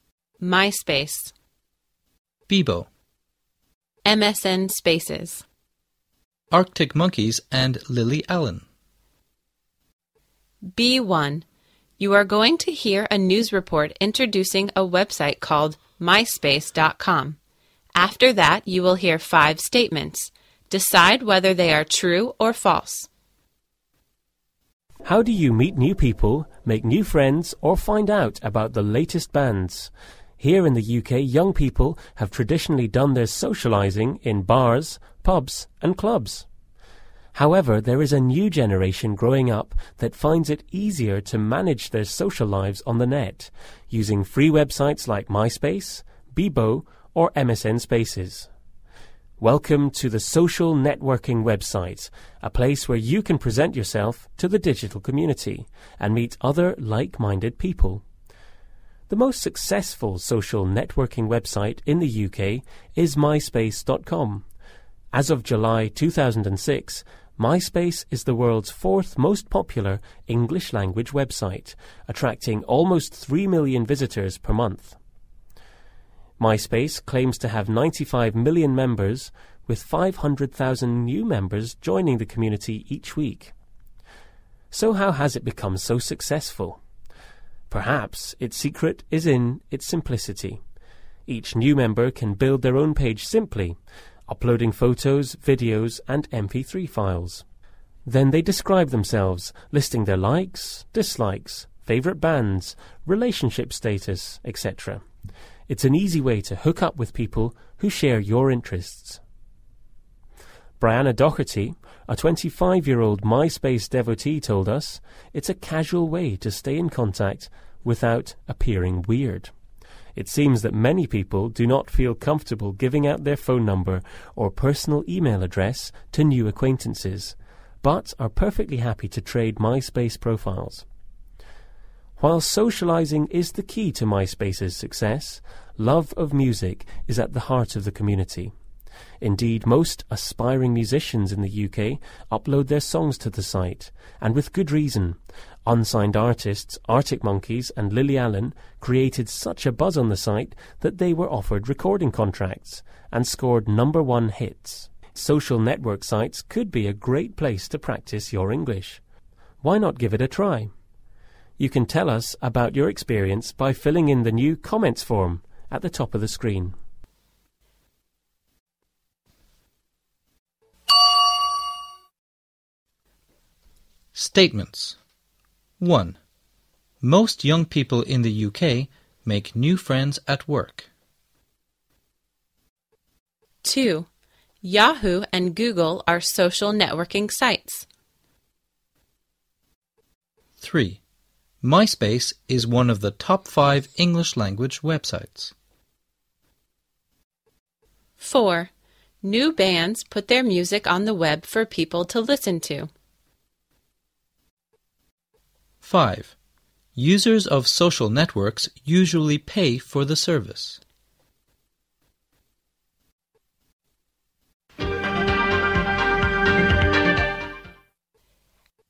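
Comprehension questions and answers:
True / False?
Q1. Most young people in the UK make new friends at work.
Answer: False

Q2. Yahoo and Google are social networking sites.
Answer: False

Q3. MySpace is one of the top 5 English language websites.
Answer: True

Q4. New bands put their music on the web for people to listen to.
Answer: True

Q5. Users of social networks usually pay for the service.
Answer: False

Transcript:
socializing, social networking website, digital community.
Vocabulary.
socialize, like-minded, upload, hook up, devotee, create a buzz, MySpace, Bebo, MSN Spaces, Artic Monkeys and Lily Allen.
B1. You're going to hear a news report introducing a website called MySpace.com, after that, you will hear 5 statements, decide whether they are true or false.
How do you meet new people, make new friends or find out about the latest bands?
Here in the UK, young people have traditionally done their socializing in bars, pubs and clubs.
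However, there is a new generation growing up that finds it easier to manage the social lives on the net, using free websites like MySpace, Bebo or MSN Spaces.
Welcome to the social networking website, a place where you can present yourself to the digital community and meet other like-minded people.
The most successful social networking website in the UK is MySpace.com.
As of July 2006, MySpace is the world's fourth most popular English Language Website, attracting almost 3 million visitors per month.
MySpace claims to have 95 million members with 500,000 new members joining the community each week.
So how has it become so successful? Perhaps its secret is in its simplicity.
Each new member can build their own page simply, uploading photos, videos and mp3 files.
Then they describe themselves, listing their likes, dislikes, favourite bands, relationship status, etc.
It's an easy way to hook up with people who share your interest.
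Briana Dougherty, a 25-year-old MySpace devotee, told us"It's a casual way to stay in contact without appearing weird."
It seems that many people do not feel comfortable giving out their phone number or personal e-mail address to new acquaintances, but are perfectly happy to trade MySpace profile.
While socializing is the key to MySpace's success, love of music is at the heart of the community.
Indeed most aspiring musicians in the UK upload their songs to the site
and with good reason, unsigned artists, Artic Monkeys and Lily Allen created such a buzz on the site that they were offered recording contracts and scored NO.1 hits.
Social network sites could be a great place to practice your English, why not give it a try?
You can tell us about your experience by filling in the new comments form at the top of the screen.
Statements.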